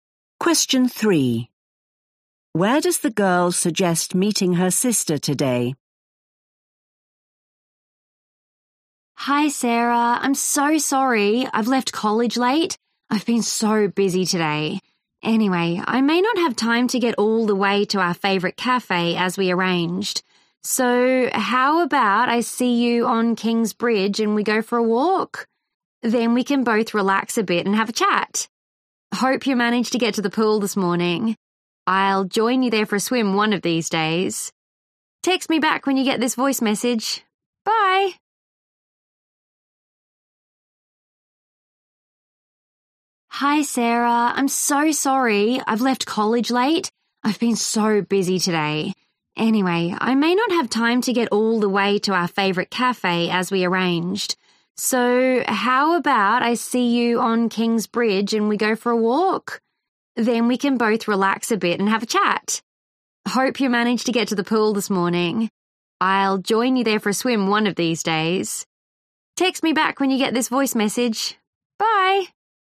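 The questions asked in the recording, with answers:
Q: Where does the girl suggest meeting her sister today?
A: on King's Bridge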